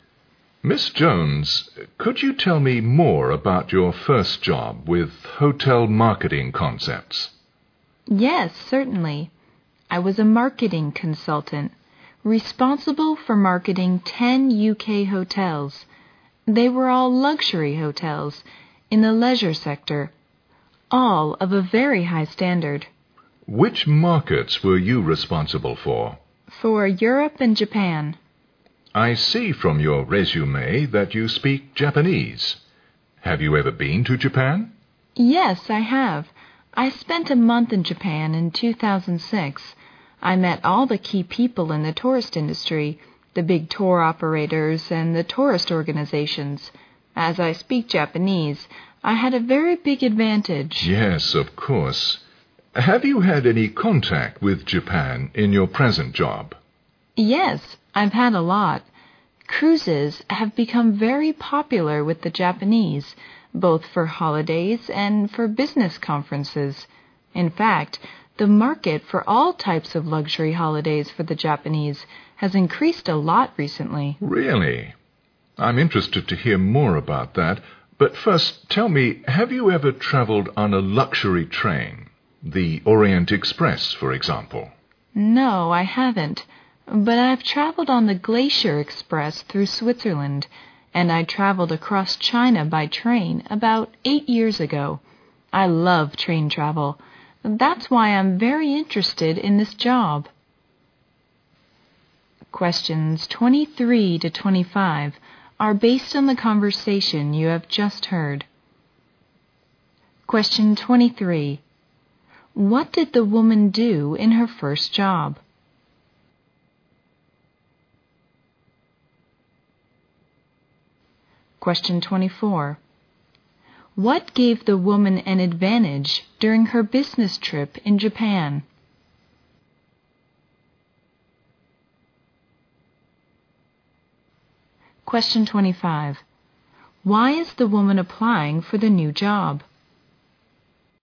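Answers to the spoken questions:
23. She was a marketing consultant for 10 UK luxury hotels.
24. She speaks Japanese.
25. She loves train travel.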